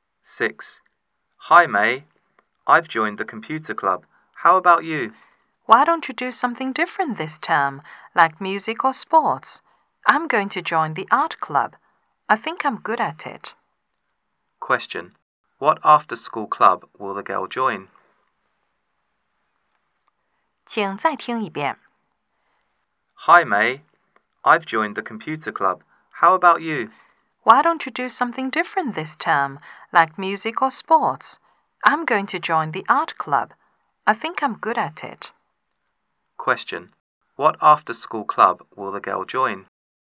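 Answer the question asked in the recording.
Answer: The art club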